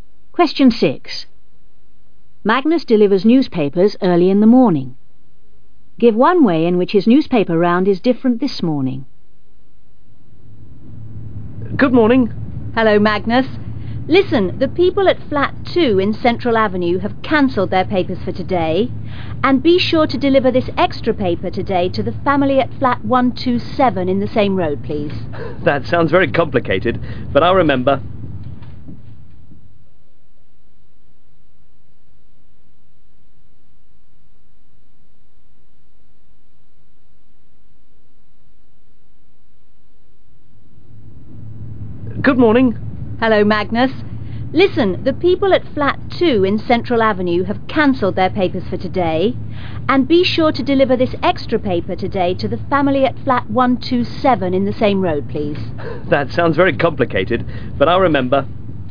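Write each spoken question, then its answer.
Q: Give one way in which his newspaper round is different this morning.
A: No paper for Flat 2 / an extra paper for Flat 127 in Central Avenue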